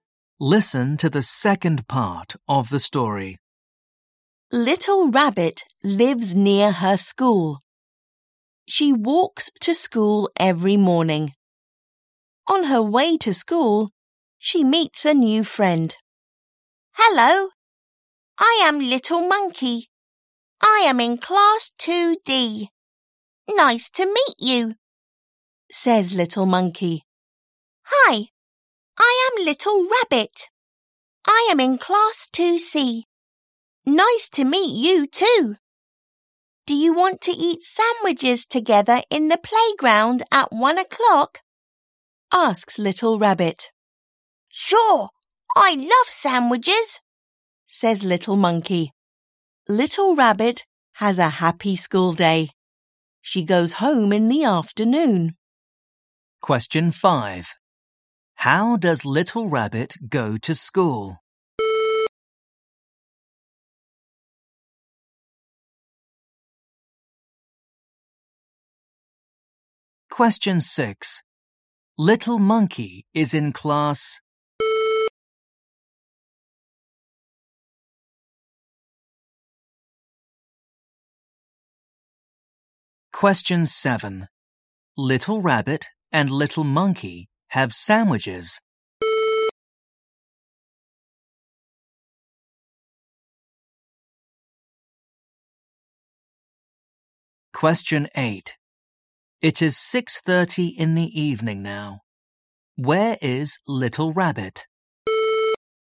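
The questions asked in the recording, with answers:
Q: How does Little Rabbit go to school?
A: She walks

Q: Little Monkey is in class.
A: 2D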